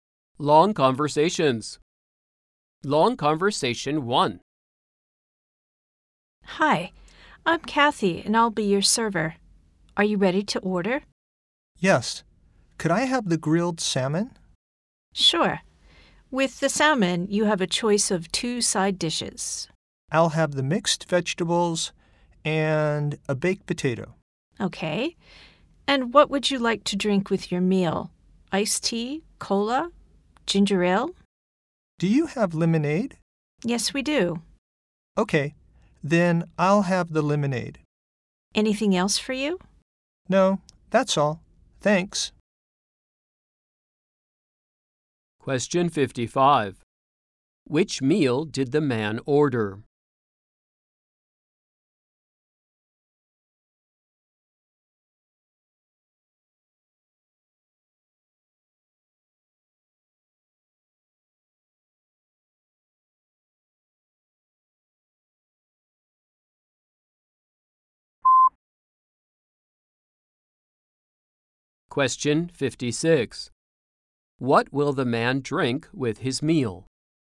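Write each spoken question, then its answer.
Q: Which meal did the man order?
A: Grilled salmon with mixed vegetables and a baked potato

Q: What will the man drink with his meal?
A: Lemonade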